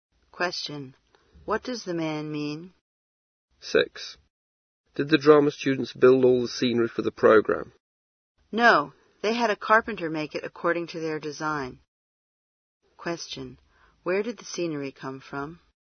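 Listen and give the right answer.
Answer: A carpenter made it to the students' design.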